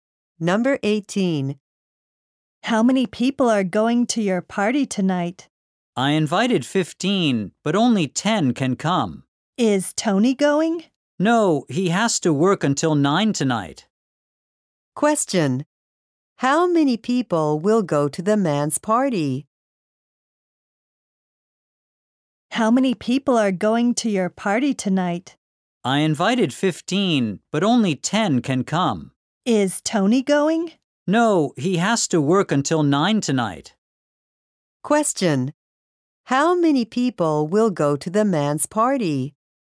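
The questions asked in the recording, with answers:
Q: How many people will go to the man's party?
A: 10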